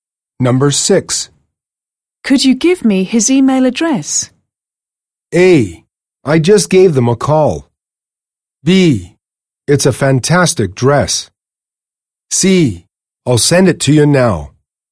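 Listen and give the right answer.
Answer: C: I'll send it to you now.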